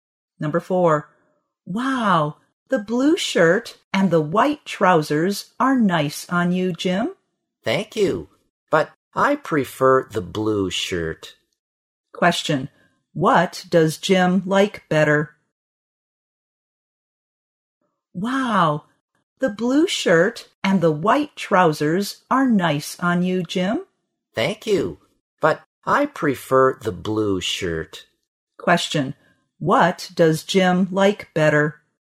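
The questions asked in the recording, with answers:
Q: what does Jim like better?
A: The blue shirt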